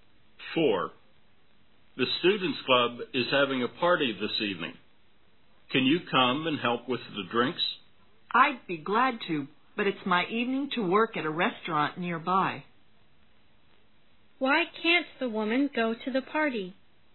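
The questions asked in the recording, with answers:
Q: Why can't the woman go to the party?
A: She has to work at a restaurant nearby that evening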